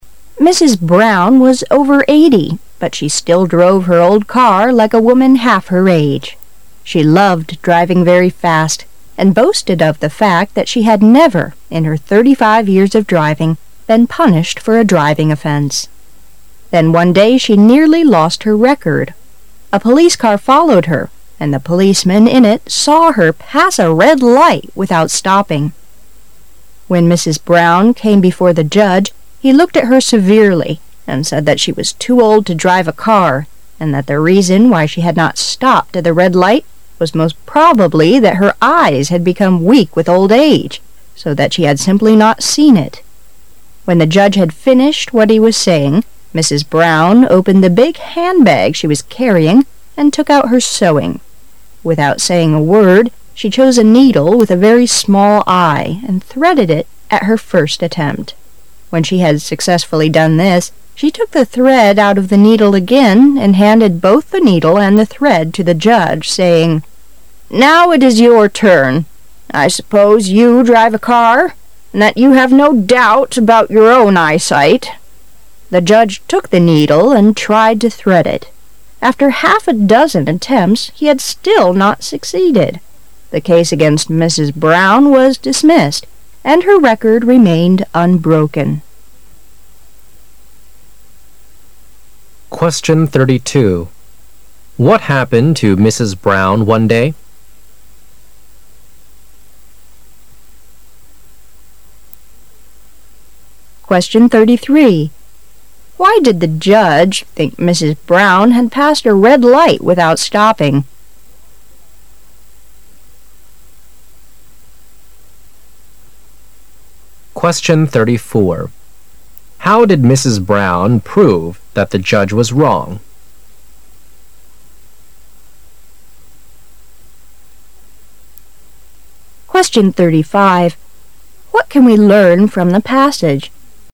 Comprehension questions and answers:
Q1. Why did the judge think Mrs.Brown had passed a red light with out stopping?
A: Because her eyesight was too poor with old age.

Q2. How did Mrs.Brown prove that the judge was wrong?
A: She threaded a needle with a small eye very easily.

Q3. What can we learn from the passage?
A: Mrs. Brown has never broken her clean record.

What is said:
Brown was over eighty, but she still drove her old car like a woman half her age. She loved driving very fast and boasted of the fact that she had never, in her thirty-five years of' driving, been punished for a driving offence. Then one day she nearly lost her record. A police car followed her, and the policeman in it saw her pass a red light without stopping. When Mrs. Brown came before the judge, he looked at her severely and said that she was too old to drive a car, and that the reason why she had not stopped at the red light was most probably that her eyes had become weak with old age, so that she had simply not seen it. When the judge had finished what he was saying, Mrs. Brown opened the big handbag she was carrying and took out her sewing. Without saying a word, she chose a needle with a very small eye, and threaded it at her first attempt. When she had successfully done this, she took the thread out of the needle again and handed both the needle and the thread to the judge, saying, "Now it is your turn. I suppose you drive a car, trod that you have no doubt about your own eyesight." The judge took the needle and tried to thread it.. After half a dozen attempts, he had still not succeeded. The case against Mrs. Brown was dismissed and her record remained unbroken. What happened to Mrs. Brown one day?